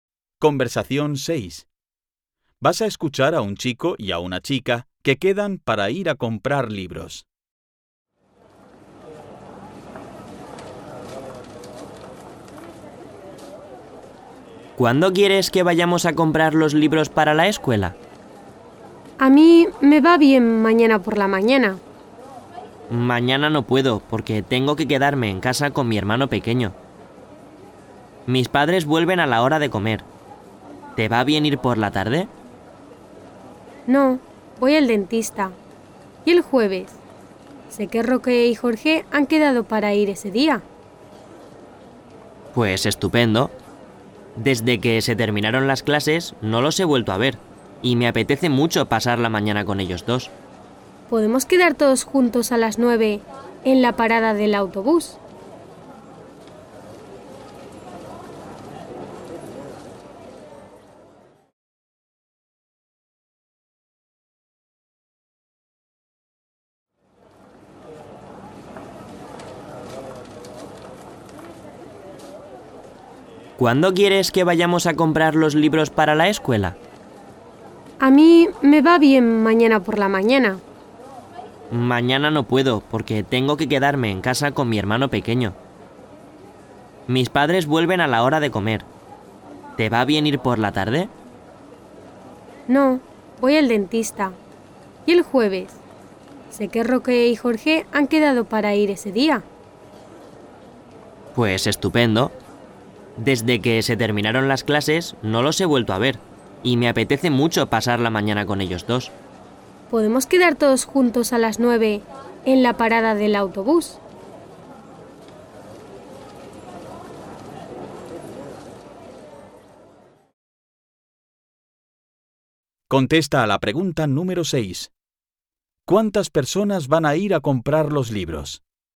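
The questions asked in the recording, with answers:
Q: ¿Cuántas personas van a ir a comprar los libros?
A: Cuatro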